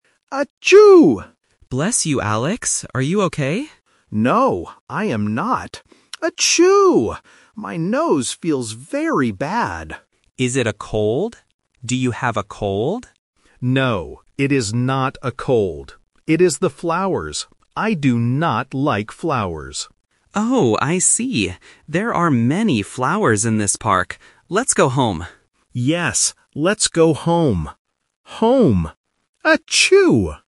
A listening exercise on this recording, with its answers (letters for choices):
Listen to the conversation in the park. Circle the correct answer (A, B, or C).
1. What is Alex's problem?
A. He has a cold.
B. His nose feels bad.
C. He has a headache.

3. Where do Alex and Ben want to go now?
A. To the hospital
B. To the park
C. To their home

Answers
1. B
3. C

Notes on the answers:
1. Alex explicitly says, "My nose feels very bad." Option A (He has a cold) is a Negative Trap because Ben asks if it is a cold, but Alex answers "No, it is not a cold." Option C (headache) is a common illness but is not mentioned in the audio.
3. Ben suggests, "Let's go home," and Alex agrees, repeating the word "home" (A1 repetition technique). Option A (To the hospital) is a plausible place to go when feeling unwell, but it is not mentioned. Option B (To the park) is wrong because they are already at the park.

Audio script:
Alex: Achoo!
Ben: Bless you, Alex. Are you okay?
Alex: No, I am not. Achoo! My nose feels very bad.
Ben: Is it a cold? Do you have a cold?
Alex: No, it is not a cold. It is the flowers. I do not like flowers.
Ben: Oh, I see. There are many flowers in this park. Let's go home.

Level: A1